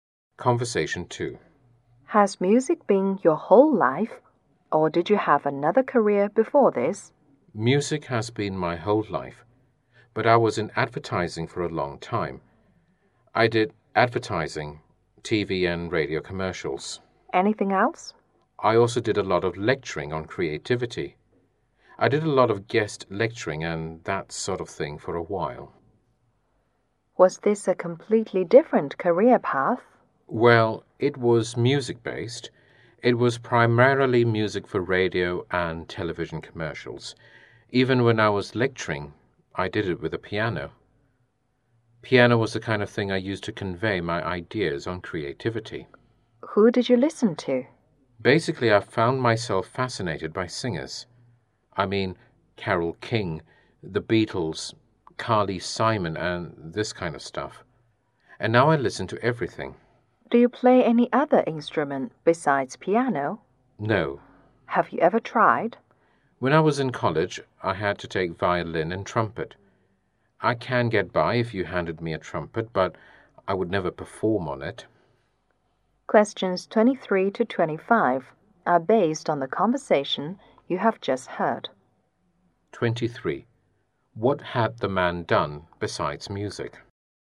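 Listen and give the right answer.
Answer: Advertising and lecturing on creativity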